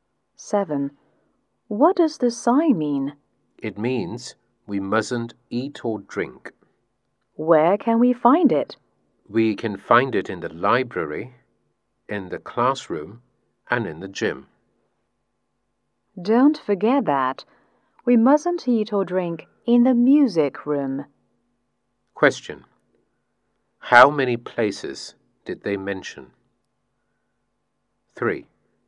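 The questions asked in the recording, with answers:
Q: Question: How many places did they mention?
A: Four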